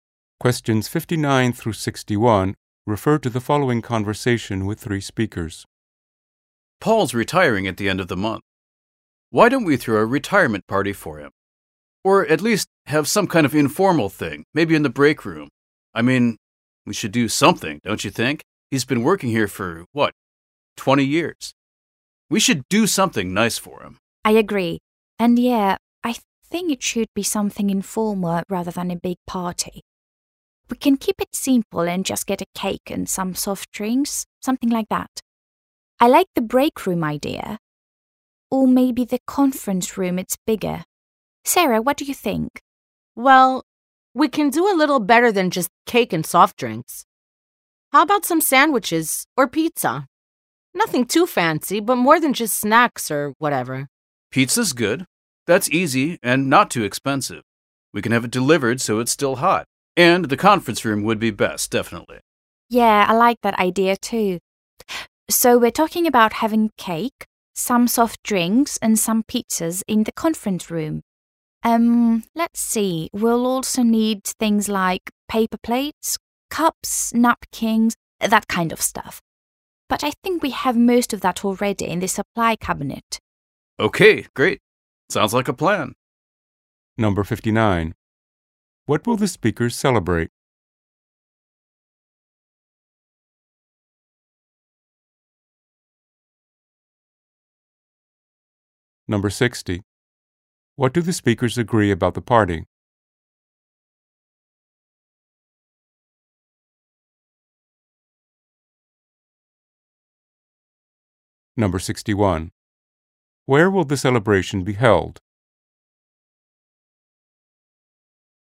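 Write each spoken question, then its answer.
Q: What will the speakers celebrate?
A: Paul's retirement

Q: What do the speakers agree about the party?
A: It should be informal

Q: Where will the celebration be held?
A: In the conference room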